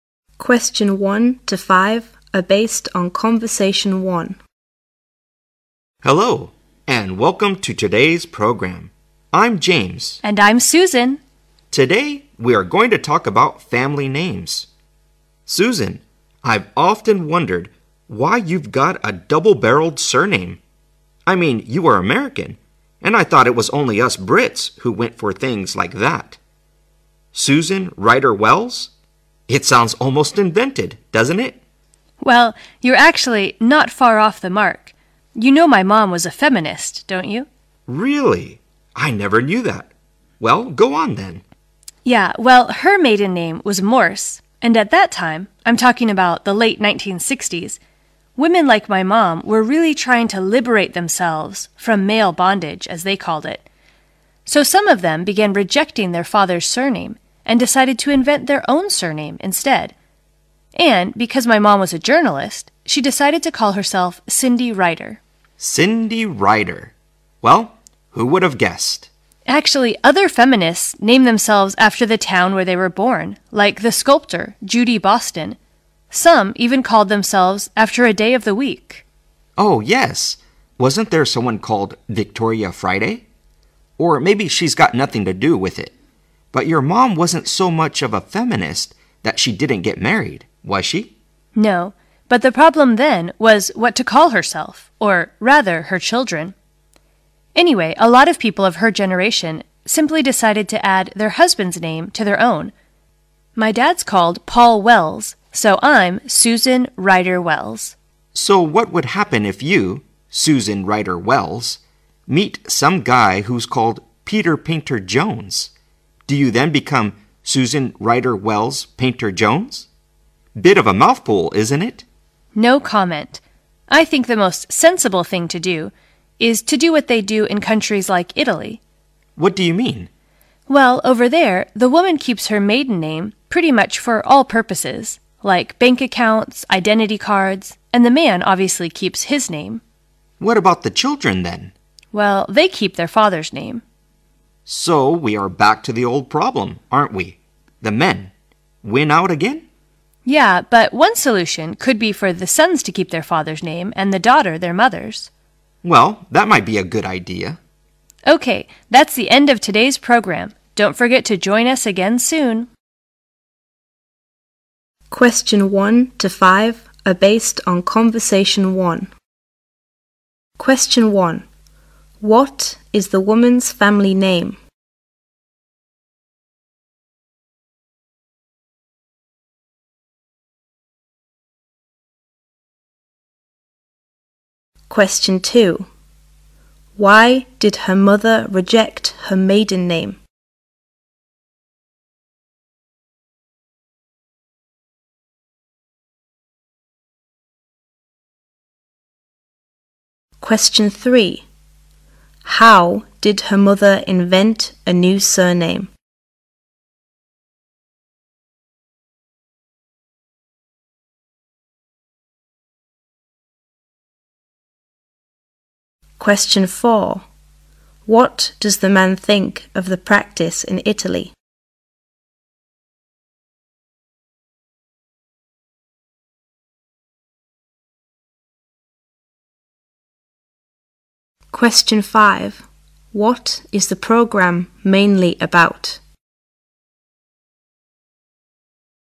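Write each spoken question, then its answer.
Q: What is the woman's family name?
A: Ryder Wells

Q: Why did her mother reject her maiden name?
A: She was a feminist trying to liberate herself from male bondage, so she rejected her father's surname

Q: How did her mother invent a new surname?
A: She based it on her job as a journalist (a writer), so she called herself Ryder

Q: What is the program mainly about?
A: Family names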